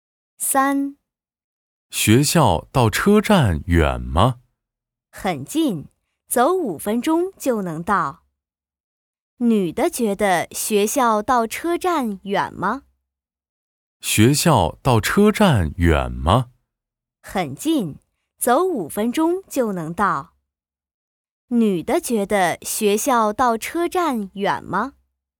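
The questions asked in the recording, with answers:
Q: 女的觉得学校到车站远吗?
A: 不远,很近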